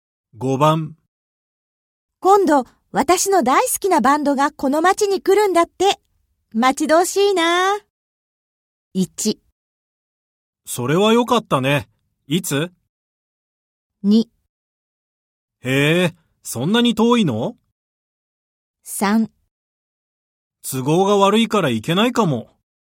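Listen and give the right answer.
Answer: 1: それはよかったね。いつ?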